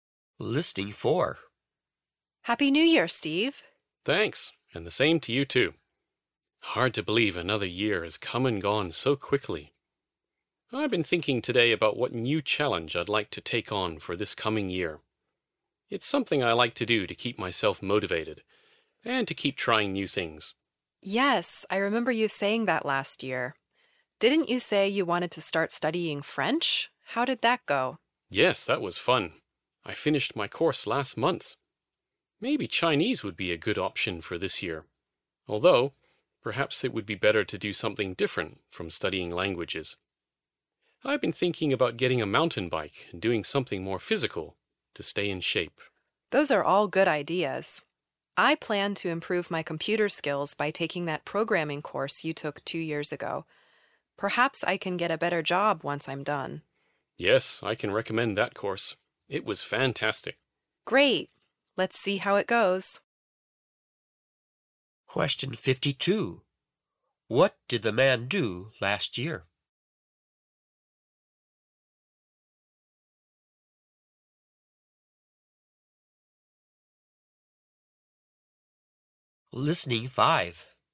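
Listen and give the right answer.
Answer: He studied French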